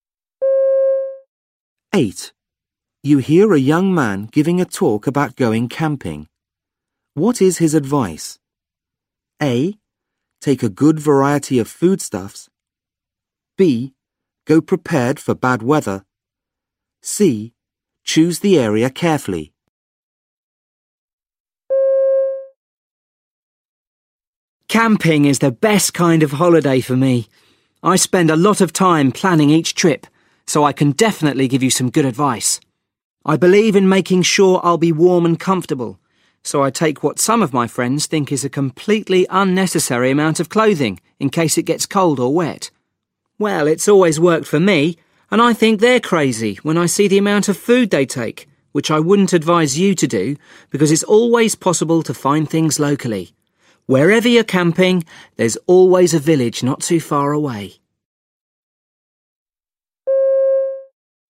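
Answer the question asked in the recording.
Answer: B: Go prepared for bad weather.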